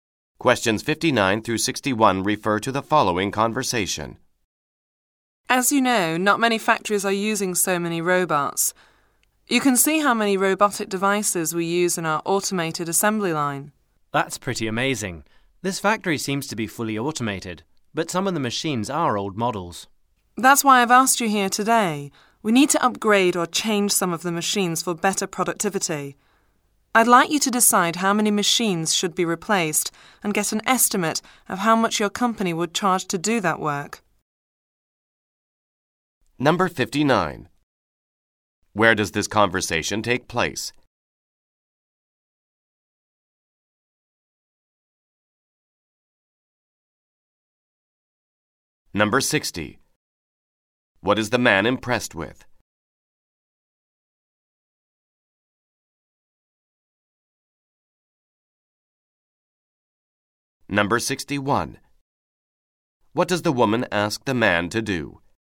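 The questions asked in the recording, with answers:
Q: Where does this conversation take place?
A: In a factory

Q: What is the man impressed with?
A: The factory's automation with many robots

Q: What does the woman ask the man to do?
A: Decide which machines to replace and give a cost estimate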